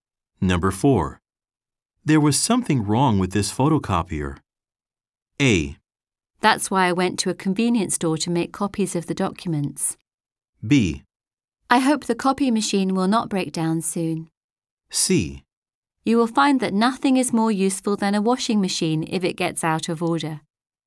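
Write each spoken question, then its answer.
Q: There was something wrong with this photocopier.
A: A: That's why I went to a convenience store to make copies of the documents.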